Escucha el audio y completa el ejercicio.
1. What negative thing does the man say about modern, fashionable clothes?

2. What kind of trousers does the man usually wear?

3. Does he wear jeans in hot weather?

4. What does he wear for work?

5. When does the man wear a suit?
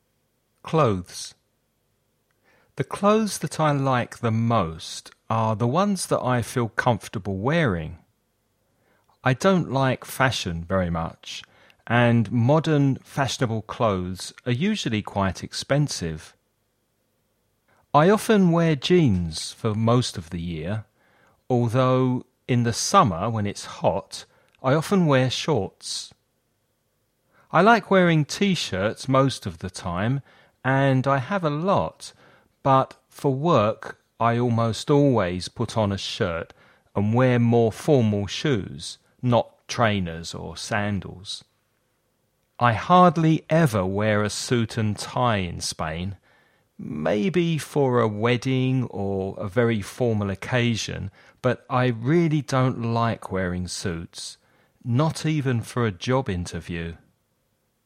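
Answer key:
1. They are usually quite expensive.
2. Jeans
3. No, he often wears shorts.
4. A shirt and more formal shoes
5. Hardly ever, maybe for a wedding or a very formal occasion

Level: nivel básico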